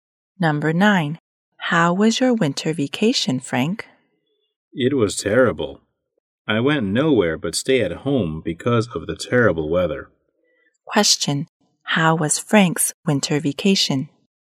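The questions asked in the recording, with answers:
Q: how was Frank's winter vacation?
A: Terrible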